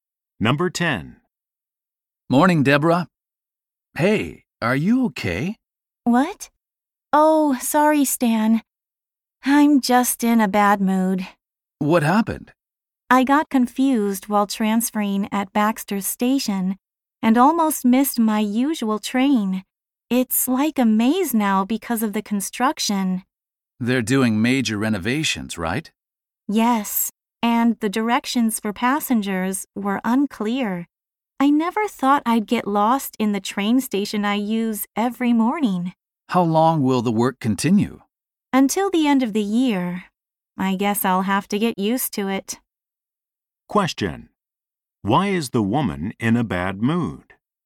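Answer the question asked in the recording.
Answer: She got lost transferring at Baxter Station because of construction and almost missed her train.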